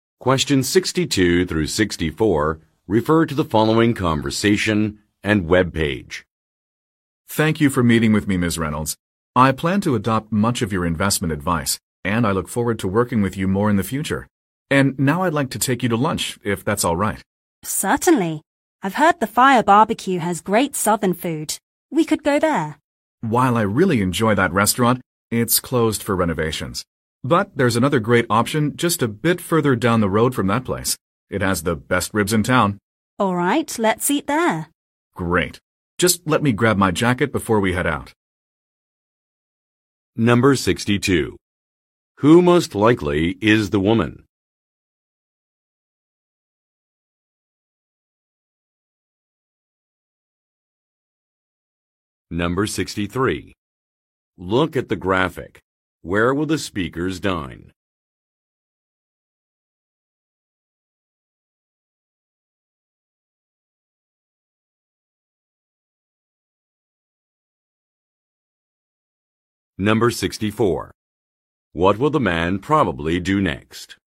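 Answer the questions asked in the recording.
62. A financial (investment) advisor
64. Get his jacket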